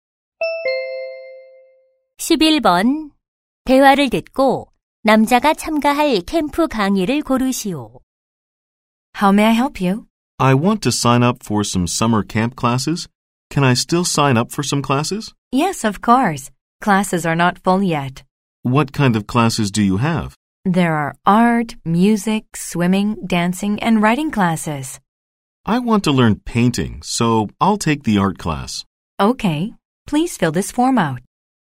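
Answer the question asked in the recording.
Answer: 미술 수업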